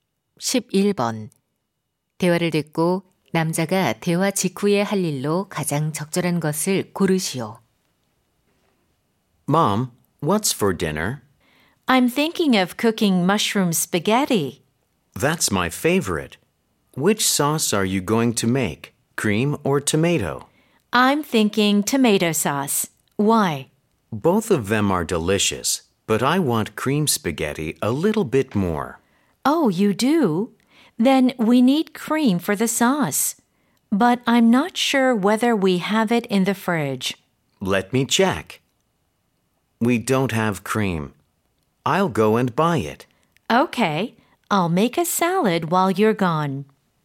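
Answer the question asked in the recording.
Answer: 크림 사러 가기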